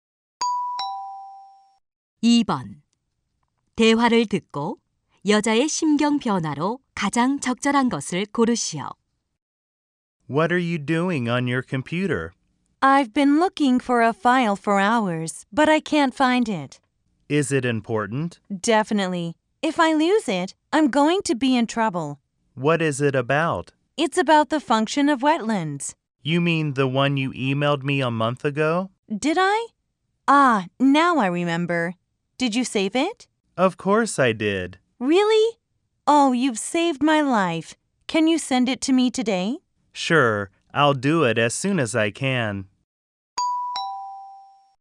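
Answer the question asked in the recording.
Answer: 걱정스러움 → 안도함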